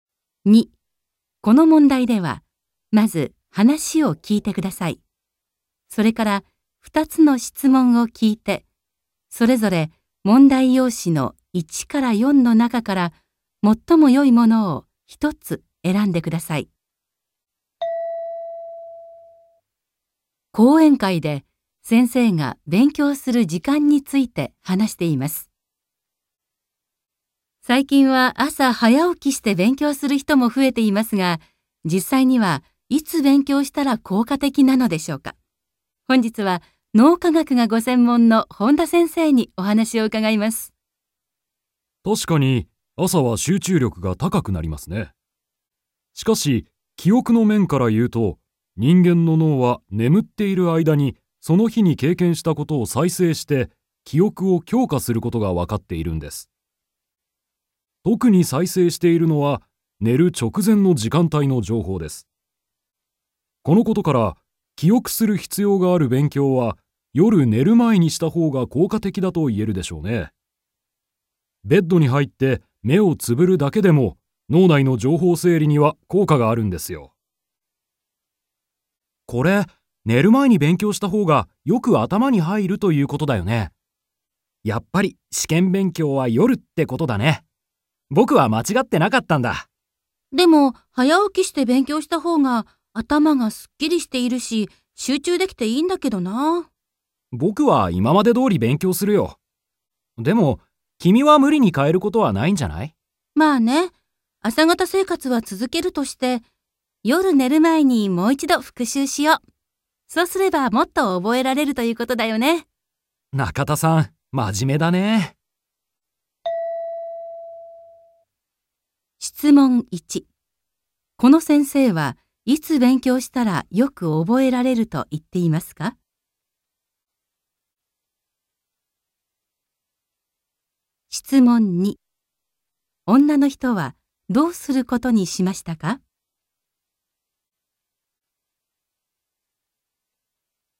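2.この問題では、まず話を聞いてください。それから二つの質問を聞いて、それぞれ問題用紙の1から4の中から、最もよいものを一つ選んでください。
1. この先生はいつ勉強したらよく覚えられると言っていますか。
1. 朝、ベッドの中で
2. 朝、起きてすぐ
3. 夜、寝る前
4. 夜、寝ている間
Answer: 3. 夜、寝る前

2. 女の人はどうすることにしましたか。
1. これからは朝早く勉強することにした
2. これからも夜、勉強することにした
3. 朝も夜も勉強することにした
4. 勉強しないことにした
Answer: 3. 朝も夜も勉強することにした

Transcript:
F:最近は朝早起きして勉強する人も増えていますが、実際にはいつ勉強したら効果的なのでしょうか。本日は脳科学がご専門の本田先生にお話を伺います。
M:確かに朝は集中力が高くなりますね。しかし記憶の面からいうと、人間の脳は眠っている間にその日に経験したことを再生して、記憶を強化することがわかっているんです。特に再生しているのは寝る直前の時間帯の情報です。このことから記憶する必要がある勉強は夜寝る前にしたほうが効果的だと言えるでしょうね。ベッドに入って、目をつぶるだけでも脳内の情報整理には効果があるんですよ。
M:これ、寝る前に勉強したほうが、よく頭に入るということだよね。やっぱり、試験勉強は夜ってことだね。僕は間違ってなかったんだ。
F:でも、早起きして勉強したほうが、頭がすっきりしているし集中できていいんだけどな。
M:ぼくは今までどおり勉強するよ。でも君は無理に変えることはないんじゃない?
F:まあね。朝型生活はつづけるとして、夜寝る前にもう一度復習しよう。そうすれば、もっと覚えられるということだよね。

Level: N2

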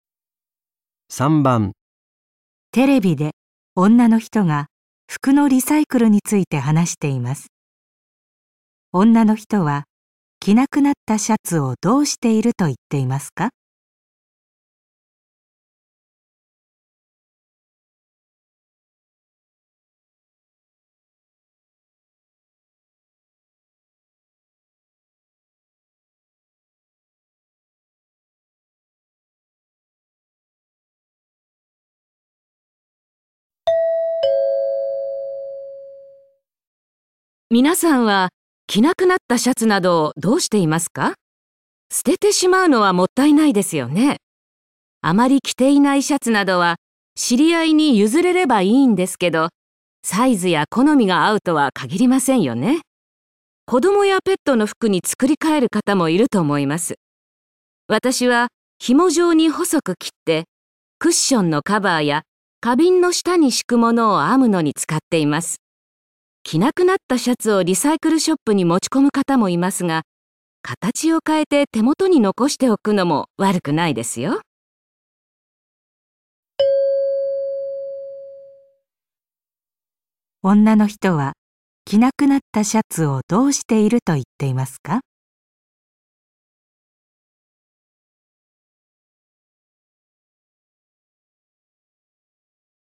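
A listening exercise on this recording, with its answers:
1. 女の人は着なくなったシャツをどうしていると言っていますか。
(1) 知り合いの人にゆずる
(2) 手を加えて、違う服にする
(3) あみものの材料として使う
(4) リサイクルショップに売る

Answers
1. (3) あみものの材料として使う

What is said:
皆さんは着なくなったシャツなどをどうしていますか。捨ててしまうのはもったいないですよね。あまり着ていないシャツなどは知り合いに譲れればいいんですけど、サイズや好みが合うとは限りませんよね。子供やペットの服に作り替える方もいると思います。私は紐状に細く切って、クッションのカバーや花瓶の下に敷くものを編むのに使っています。着なくなったシャツをリサイクルショップに持ち込む方もいますが、形を換えて、手元に残しておくのも悪くないですよ。

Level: N2 第3回】聴解

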